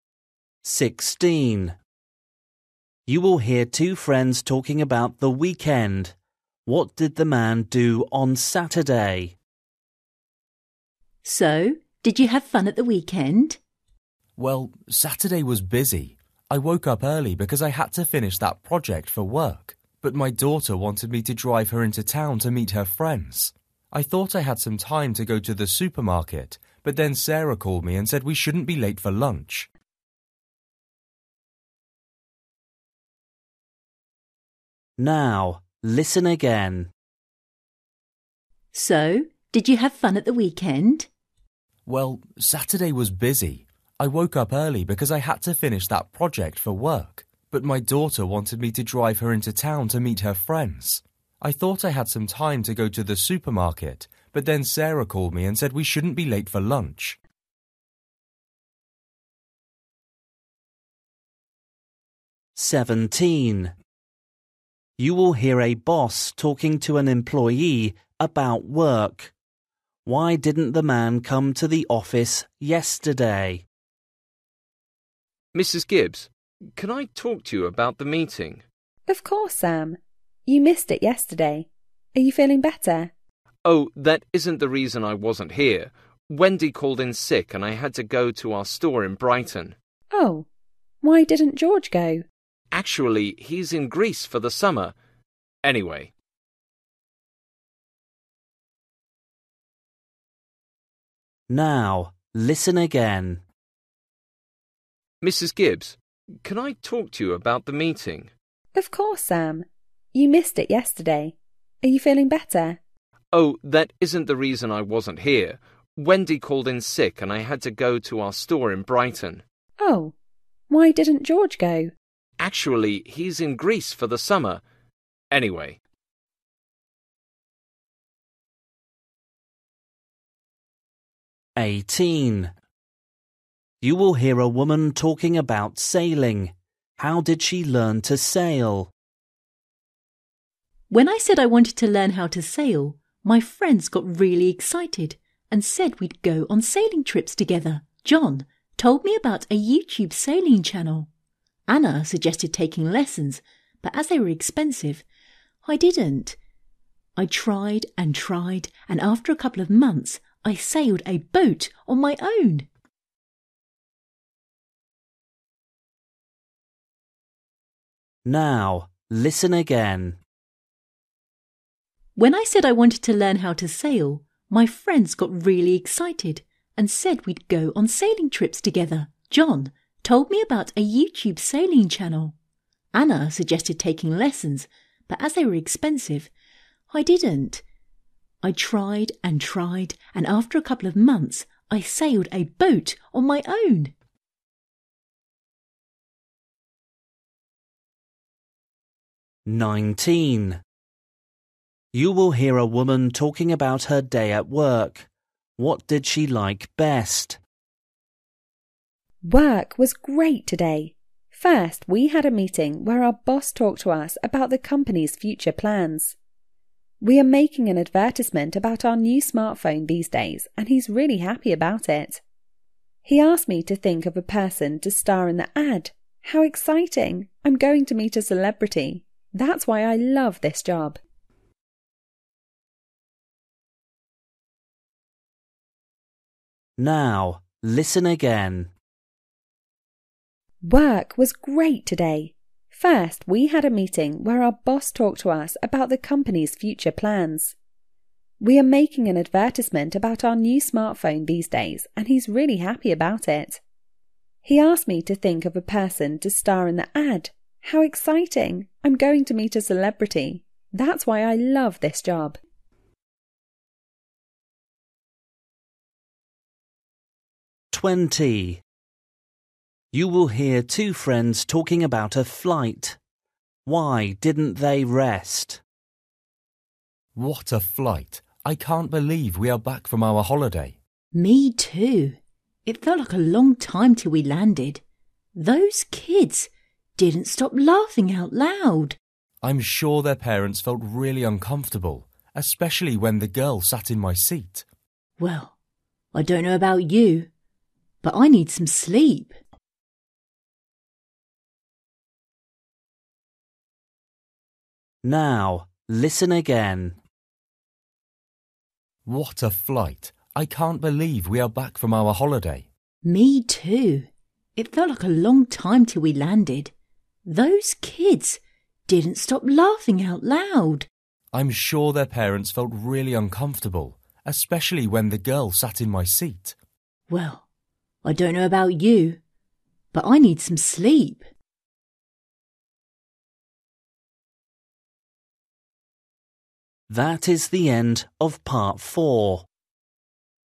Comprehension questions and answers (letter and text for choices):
For each question, choose the correct answer.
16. What did the man do on Saturday?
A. He went shopping.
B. He spent time with his family.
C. He went to work.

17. Why didn't the man come to the office yesterday?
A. He was sick.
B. He was on a business trip.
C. He was on holiday.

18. How did she learn to sail?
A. Her friends taught her.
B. She got a sailing teacher.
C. She practised a lot.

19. What did she like best?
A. the conversation with her boss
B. the new advertisement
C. her new project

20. Why didn't they rest?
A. The flight was too long.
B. It was quite noisy.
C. The seats were uncomfortable.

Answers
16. B. He spent time with his family.
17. B. He was on a business trip.
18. C. She practised a lot.
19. C. her new project
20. B. It was quite noisy.

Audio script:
16 You will hear two friends talking about the weekend.
F: So did you have fun at the weekend?
M: Well, Saturday was busy. I woke up early because I had to finish that project for work but my daughter wanted me to drive her into town to meet her friends. I thought I had some time to go to the supermarket but then Sarah called me and said we shouldn't be late for lunch.
17 You will hear a boss talking to an employee about work.
M: Mrs Gibbs, can I talk to you about the meeting?
F: Of course, Sam. You missed it yesterday. Are you feeling better?
M: Oh that isn't the reason I wasn't here. Wendy called in sick and I had to go to our store in Brighton.
F: Oh, why didn't George go?
M: Actually, he's in Greece for the summer. Anyway...
18 You will hear a woman talking about sailing. How did she learn to sail?
F: When I said I wanted to learn how to sail, my friends got really excited and said we'd go on sailing trips together... John told me about a YouTube sailing channel. Anna suggested taking lessons but as they were expensive, I didn't. I tried and tried and after a couple of months I sailed a boat on my own.
19 You will hear a woman talking about her day at work. What did she like best?
F: Work was great today! First, we had a meeting where our boss talked to us about the company's future plans. We are making an advertisement about our new smart phone these days and he's really happy about it. He asked me to think of a person to star in the ad. How exciting! I'm going to meet a celebrity. That's why I love this job.
20 You will hear two friends talking about a flight. Why didn't they rest?
M: What a flight! I can't believe we are back from our holiday.
F: Me too. It felt like a long time till we landed. Those kids didn't stop laughing out loud.
M: I'm sure their parents felt really uncomfortable, especially when the girl sat in my seat.
F: Well, I don't know about you but I need some sleep.

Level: KET (A2)